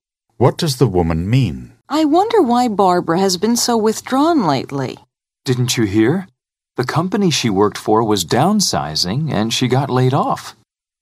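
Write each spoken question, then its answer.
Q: What does the man say about Barbara?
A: She lost her job.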